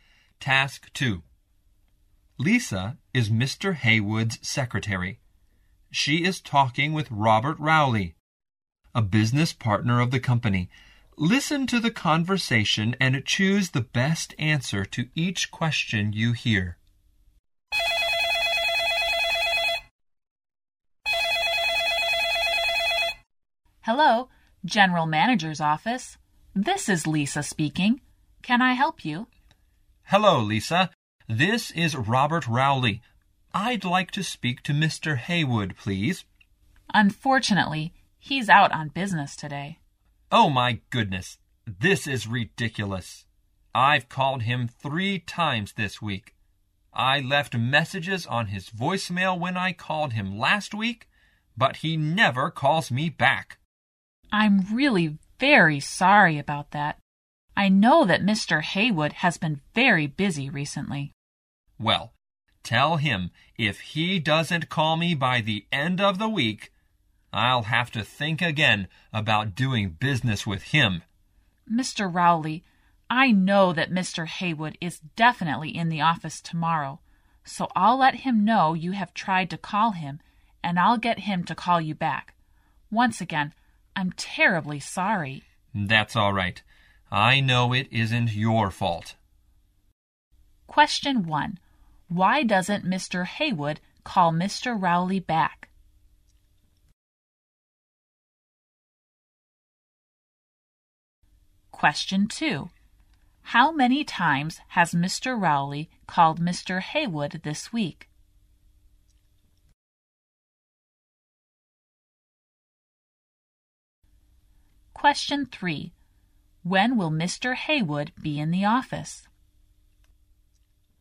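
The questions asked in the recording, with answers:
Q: Why doesn't Mr. Haywood call Mr. Rowley back?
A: He has been very busy recently.

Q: How many times has Mr. Rowley called Mr. Haywood this week?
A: 3 times

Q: When will Mr. Haywood be in the office?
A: Tomorrow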